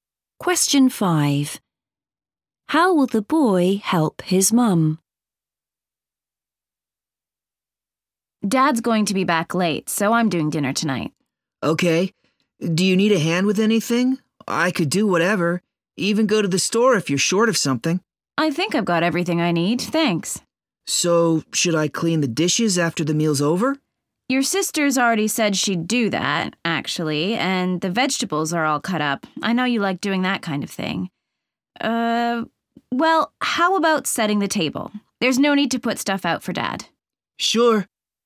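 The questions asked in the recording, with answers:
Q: How will the boy help his mum?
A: By setting the table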